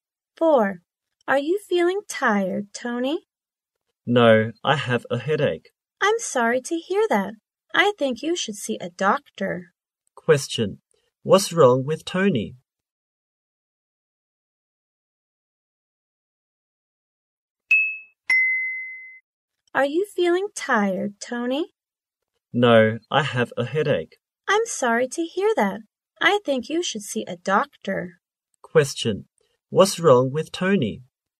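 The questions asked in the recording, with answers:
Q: What's wrong with Tony?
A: He has a headache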